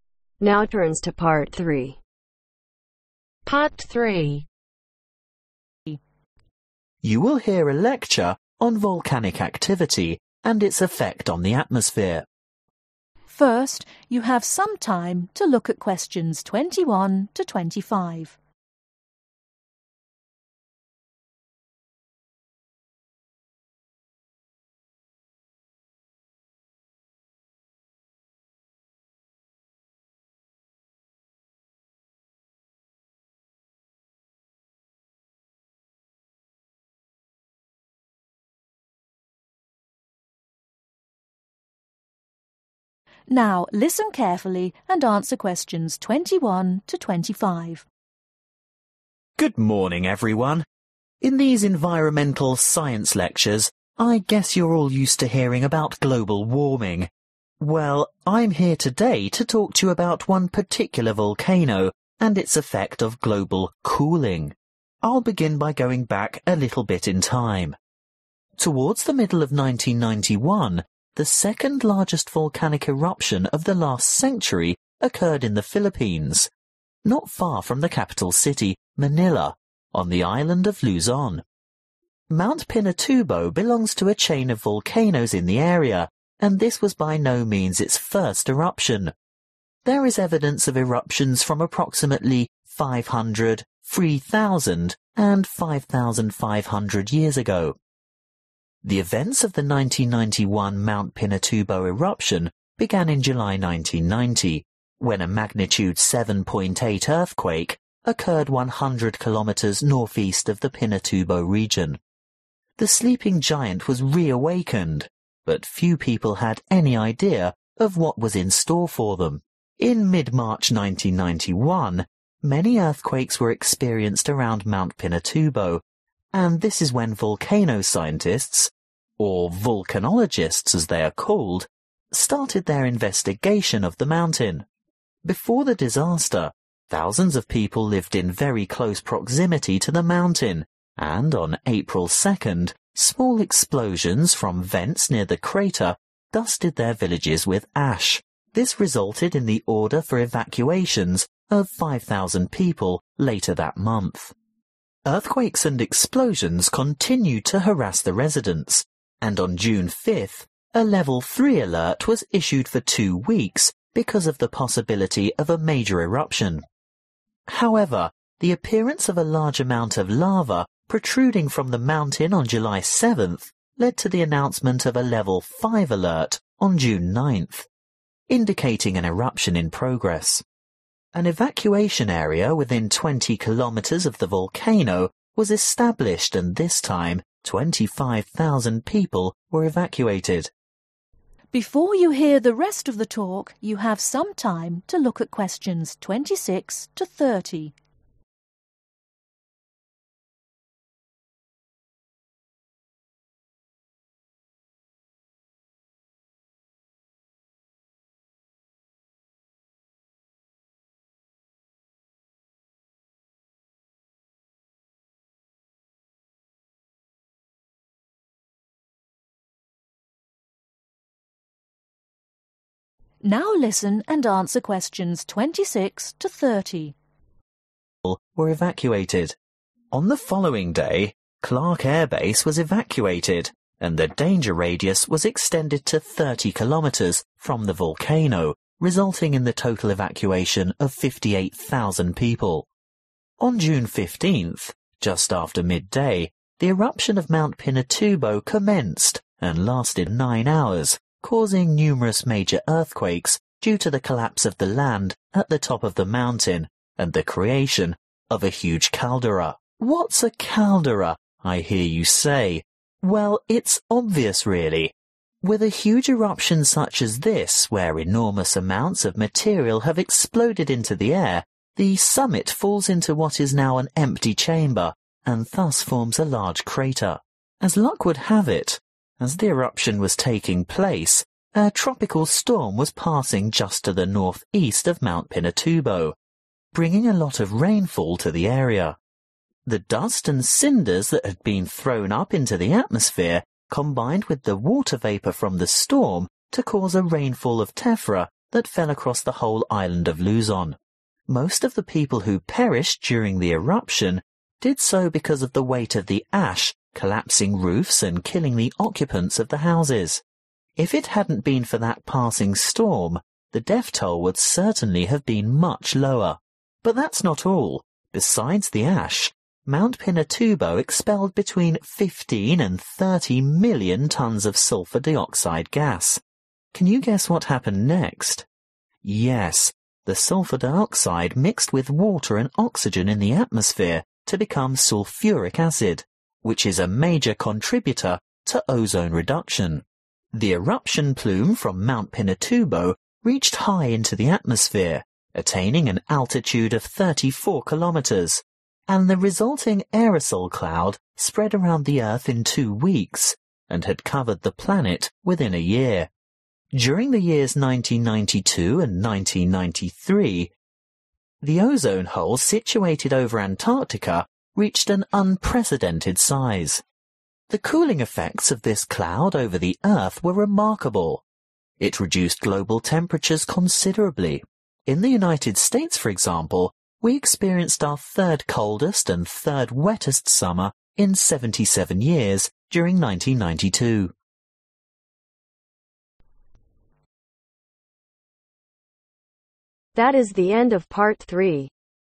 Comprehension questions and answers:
Write NO MORE THAN THREE WORDS AND/OR A NUMBER for each answer.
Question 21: When did Mt. Pinatubo erupt for the first time ?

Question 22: When was the earthquake measuring 7.8 recorded ?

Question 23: When did the experts begin to study Mt. Pinatubo ?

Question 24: What fell on the local villages on 2nd April ?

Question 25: What does a 'Level 5' alert mean ?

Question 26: Several large earthquakes were triggered by the eruption of Pinatubo on 15th June 1991 because of the (26)............ of the summit.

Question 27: At the same time a (27)............ was passing by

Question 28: which fell on the (28)............ of homes causing them to collapse, crushing hundreds of people.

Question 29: which combined with (29)............ to make sulfuric acid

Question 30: The overall effect of the cloud from this great eruption was the lowering of (30)............ .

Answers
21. 5,500 years ago
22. July 1990
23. mid-March 1991
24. ash
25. eruption in progress
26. collapse
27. tropical storm
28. roofs
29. water and oxygen
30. global temperatures